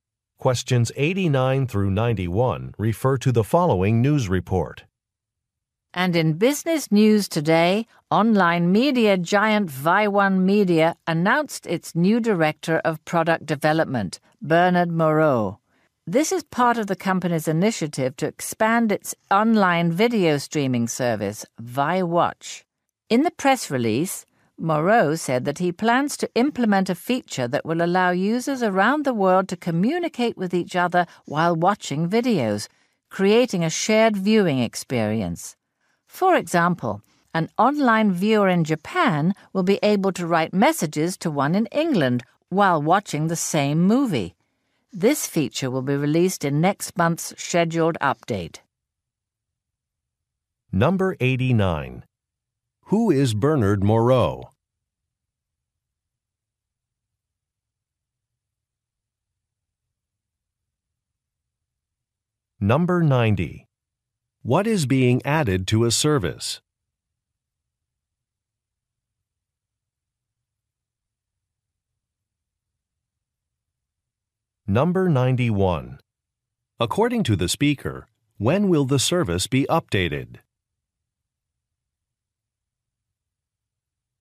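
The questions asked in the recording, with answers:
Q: Who is Bernard Moreau?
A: The new director of product development

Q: What is being added to a service?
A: A feature for users to communicate while watching videos

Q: According to the speaker, when will the service be updated?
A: Next month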